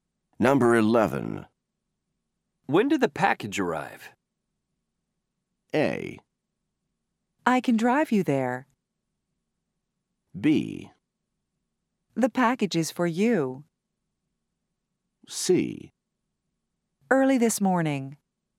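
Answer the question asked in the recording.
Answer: C: Early this morning.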